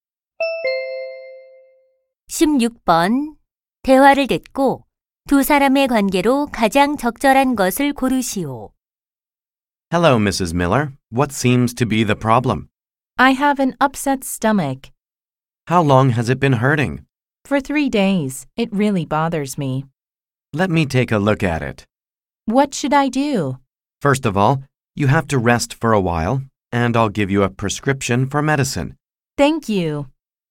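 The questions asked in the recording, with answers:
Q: 대화를 듣고 두 사람의 관계로 가장 적절한 것을 고르시오.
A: 의사와 환자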